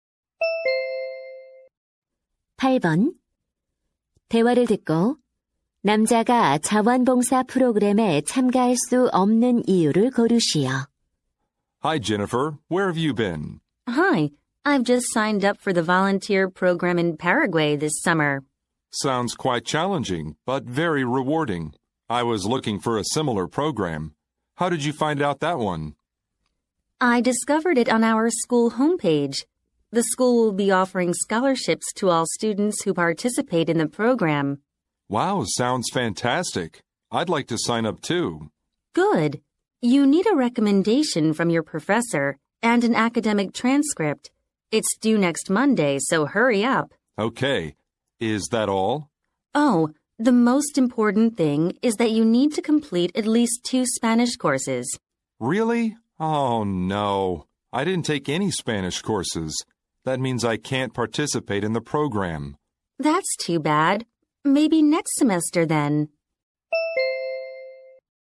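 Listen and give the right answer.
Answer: 스페인어 과목을 수강하지 않아서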